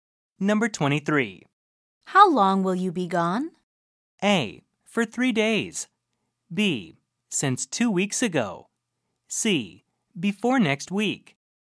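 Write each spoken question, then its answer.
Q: How long will you be gone?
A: A: For 3 days.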